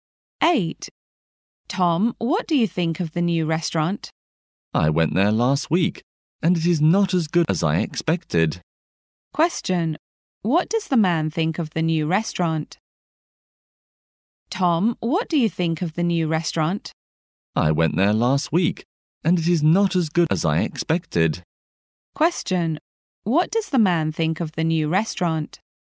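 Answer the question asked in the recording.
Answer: It is not as good as he expected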